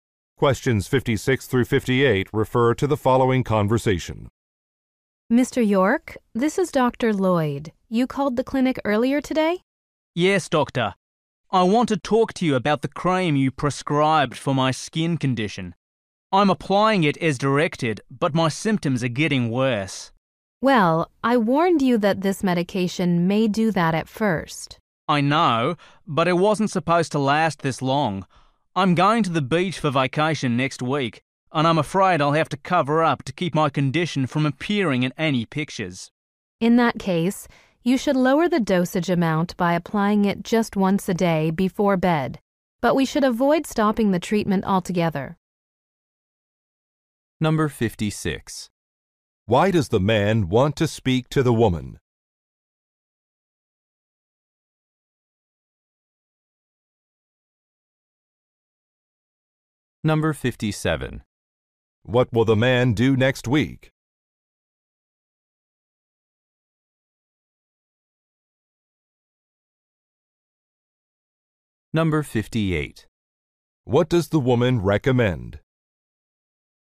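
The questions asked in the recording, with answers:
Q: Why does the man want to speak to the woman?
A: His symptoms are getting worse with the cream

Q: What will the man do next week?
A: Go on a beach vacation

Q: What does the woman recommend?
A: Applying the cream only once a day before bed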